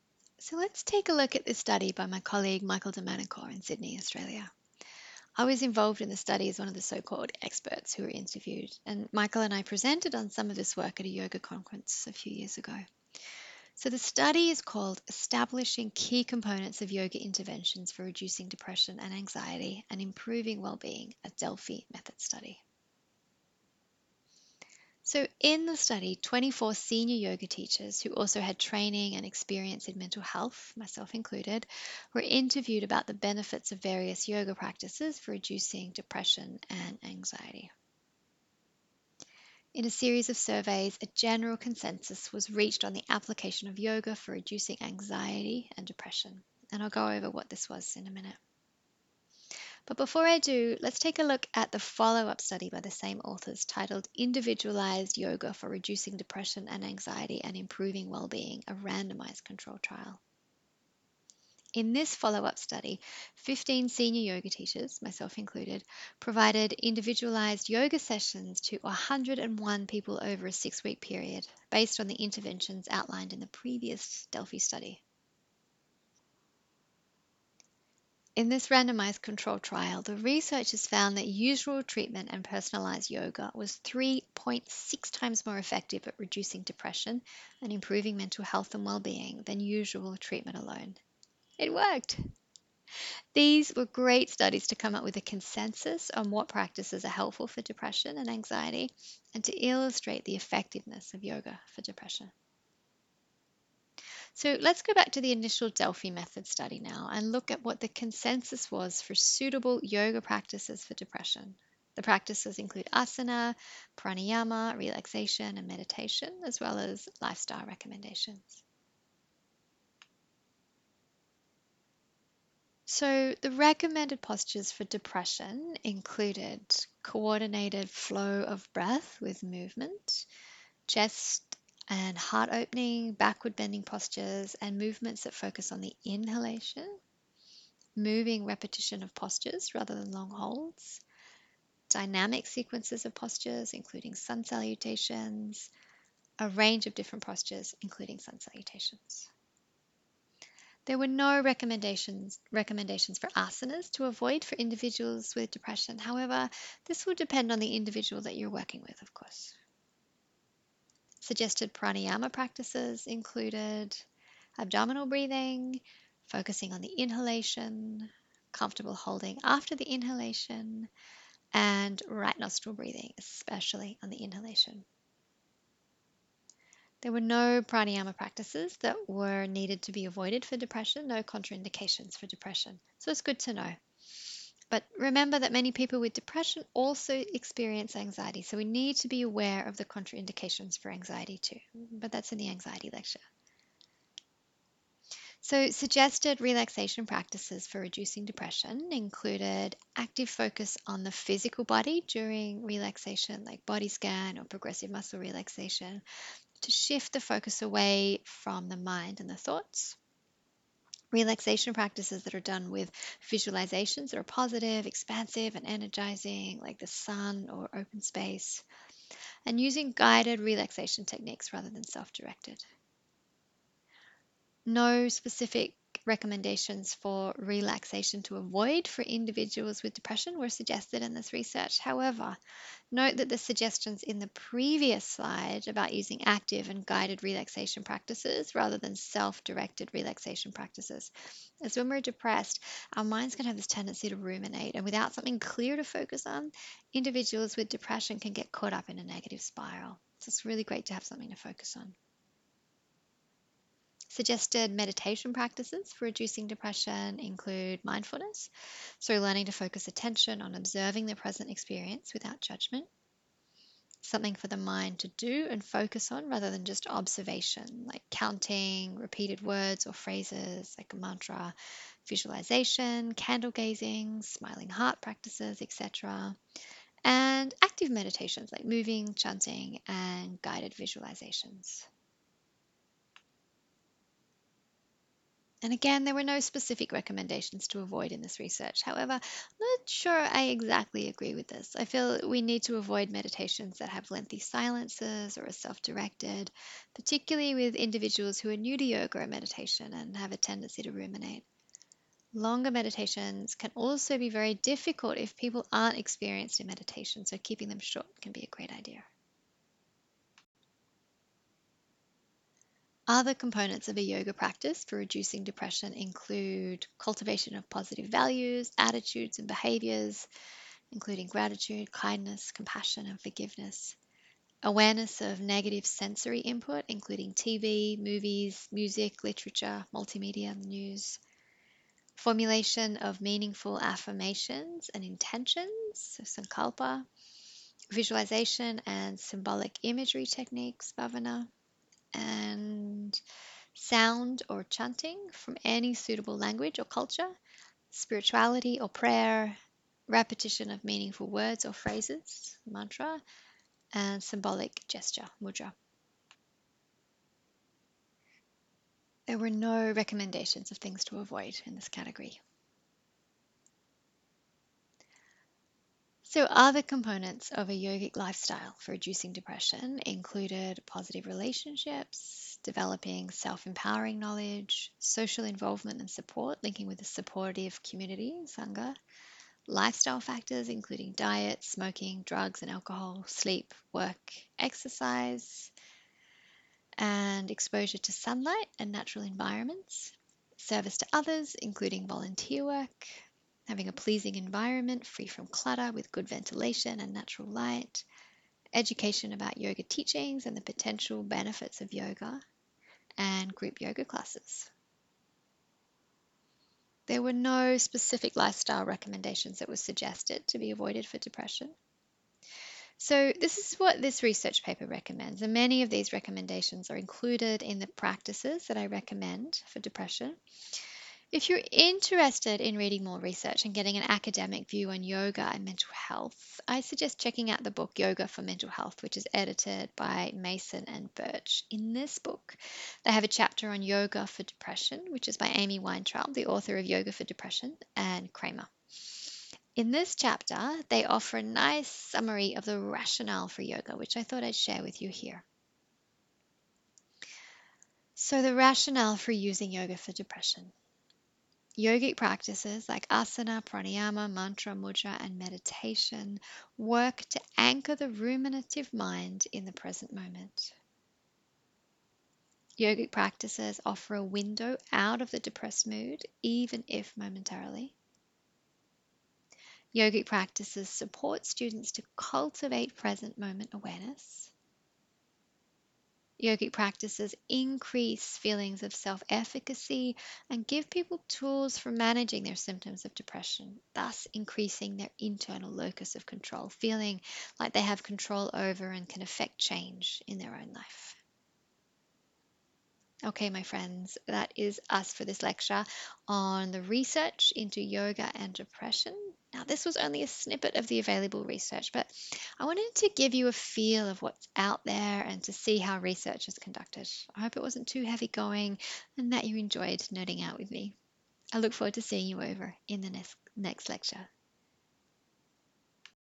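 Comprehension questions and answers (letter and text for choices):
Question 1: In the study, Establishing Key Components of Yoga Interventions for Reducing Depression and Anxiety, and Improving Well-Being: A Delphi Method Study, what prāṇāyāma practices were recommended for reducing depression?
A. Abdominal breathing, focus on exhalation, comfortable holding after exhalation and left nostril breathing, especially on exhalation.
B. Abdominal breathing, focus on inhalation, comfortable holding after inhalation and right nostril breathing, especially on inhalation.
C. Prāṇāyāma was not recommended for reducing depression.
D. None of the above.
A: B. Abdominal breathing, focus on inhalation, comfortable holding after inhalation and right nostril breathing, especially on inhalation.

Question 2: In the study, Establishing Key Components of Yoga Interventions for Reducing Depression and Anxiety, and Improving Well-Being: A Delphi Method Study, what āsanas were recommended for reducing depression?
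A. Co-ordinated flow of breath with movement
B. Chest and heart opening, backward bending postures and movements that also focus on inhalation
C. Moving repetition of postures (rather than long holds)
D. All of the above.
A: D. All of the above.

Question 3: What is the rationale for using yoga for depression?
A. Yoga works to anchor the ruminative mind in the present moment and supports students to cultivate present moment awareness.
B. Yoga offers a window out of the depressed mood (even if only momentarily).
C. Yoga gives people tools for managing their symptoms of depression and increases self-efficacy.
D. All of the above.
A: D. All of the above.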